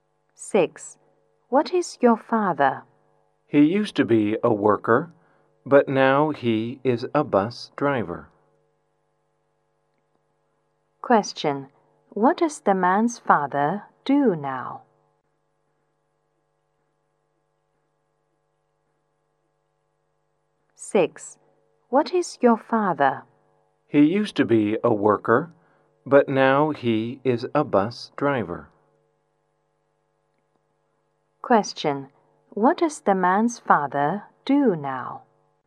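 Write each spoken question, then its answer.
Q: What does the man's father do now?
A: He is a bus driver.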